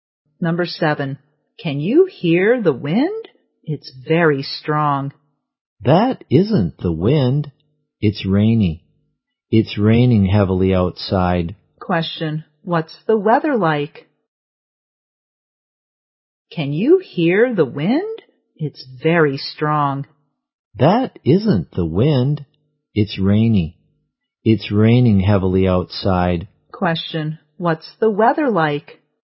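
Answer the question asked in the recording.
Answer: It's raining heavily.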